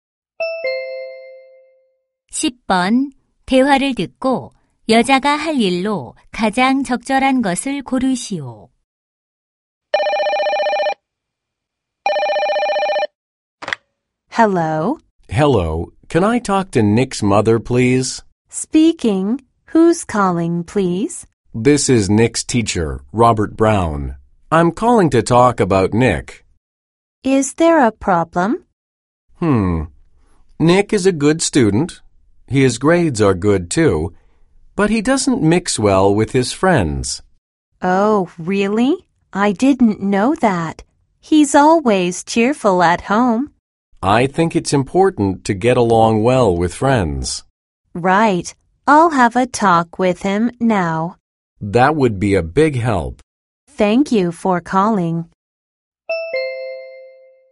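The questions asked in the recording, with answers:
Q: 대화를 듣고 여자가 할 일로 가장 적절한 것을 고르시오.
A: 아들 Nick과 이야기하기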